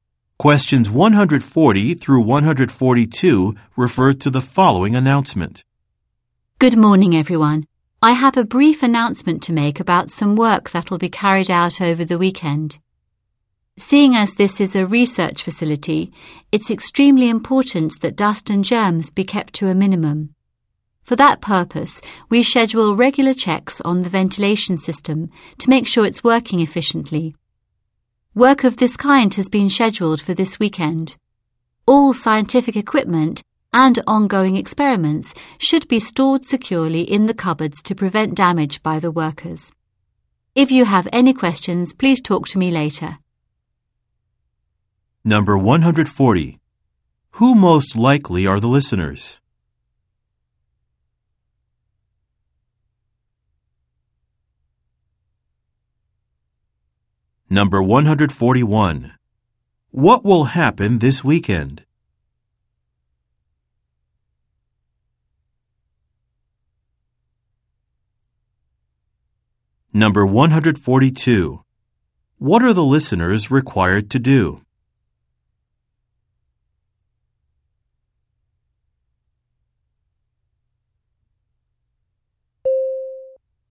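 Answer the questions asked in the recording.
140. Researchers or scientists at a research facility
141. The ventilation system will be checked
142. Store equipment and experiments securely in the cupboards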